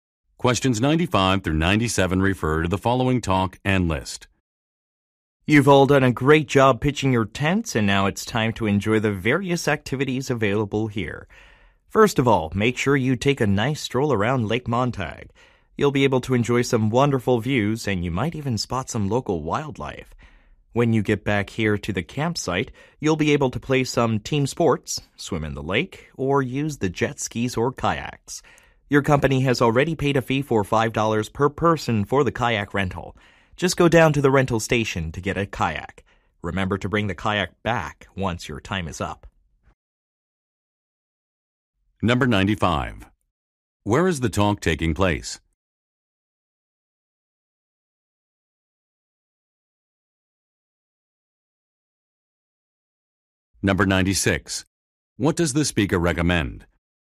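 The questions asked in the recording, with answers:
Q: Where is the talk taking place?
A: At a campsite

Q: What does the speaker recommend?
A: Taking a walk around Lake Montag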